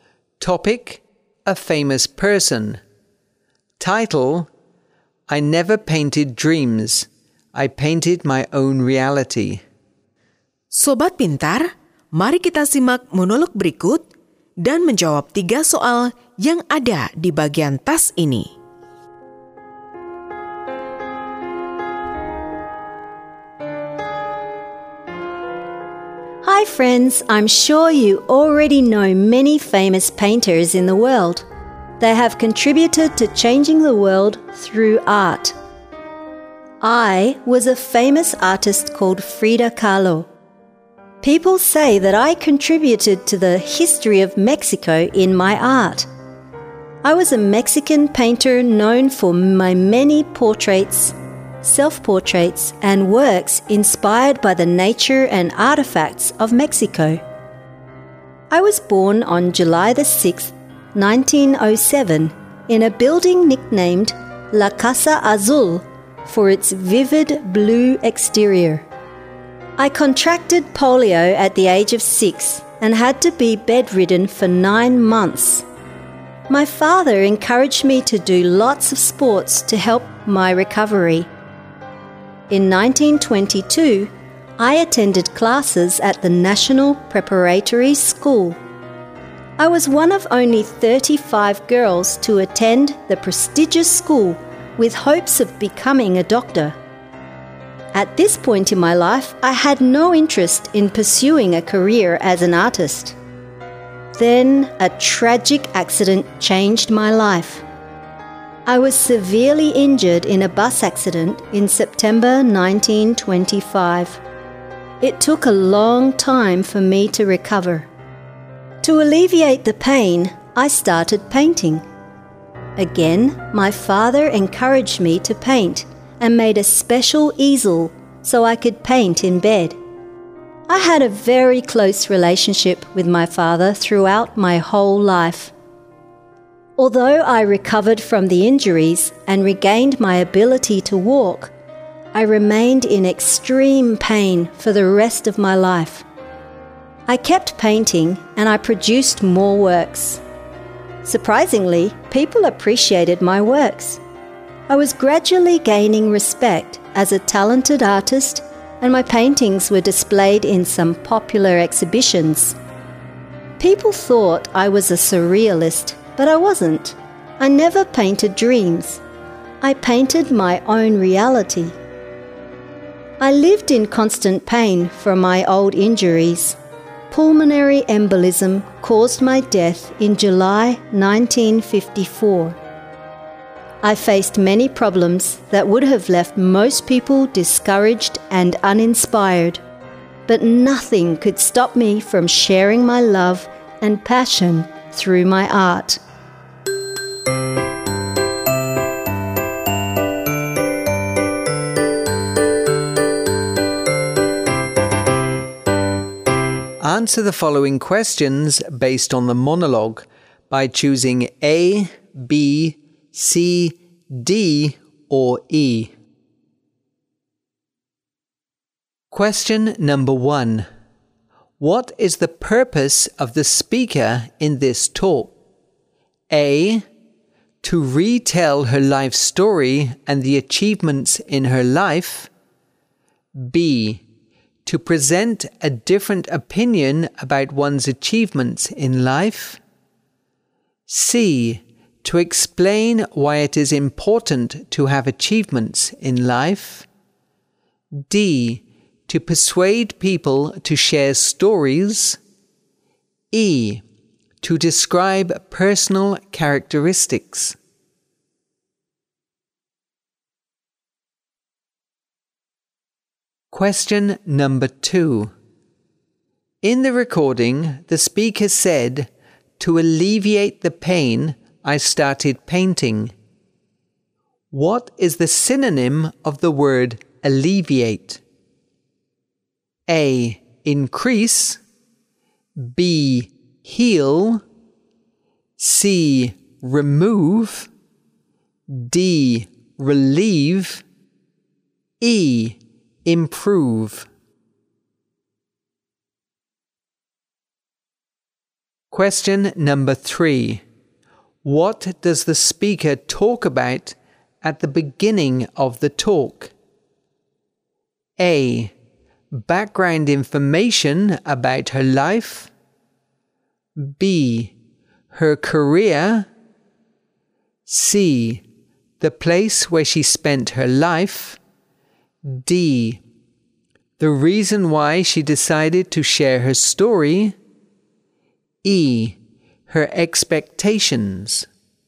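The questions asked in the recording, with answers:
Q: What is the purpose of the speaker in this talk?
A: A: To retell her life story and the achievements in her life.

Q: In the recording, the speaker said, "To alleviate the pain, I started painting." What is the synonym of the word alleviate?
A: D: Relieve.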